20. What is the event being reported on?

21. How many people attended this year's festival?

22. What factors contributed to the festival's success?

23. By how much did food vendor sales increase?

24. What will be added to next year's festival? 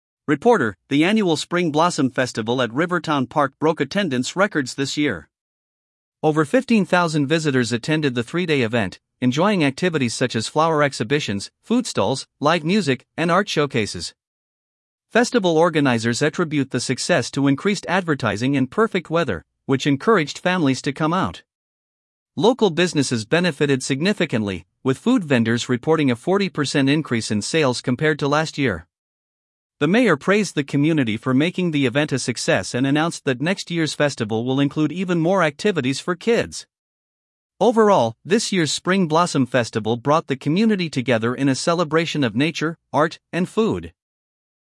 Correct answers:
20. Spring Blossom Festival
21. 15,000 visitors
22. Advertising and weather
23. 40%
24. Activities for kids

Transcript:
Reporter: The annual Spring Blossom Festival at Rivertown Park broke attendance records this year. Over 15,000 visitors attended the three-day event, enjoying activities such as flower exhibitions, food stalls, live music, and art showcases.
Festival organizers attribute the success to increased advertising and perfect weather, which encouraged families to come out. Local businesses benefited significantly, with food vendors reporting a 40% increase in sales compared to last year.
The mayor praised the community for making the event a success and announced that next year's festival will include even more activities for kids. Overall, this year's Spring Blossom Festival brought the community together in a celebration of nature, art, and food.